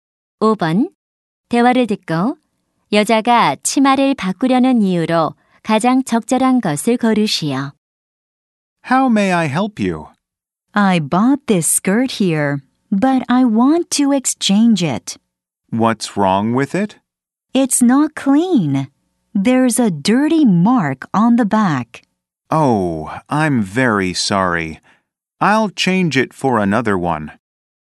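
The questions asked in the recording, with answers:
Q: 대화를 듣고 여자가 치마를 바꾸려는 이유로 가장 적절한 것을 고르시오.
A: 뒤에 얼룩이 있어서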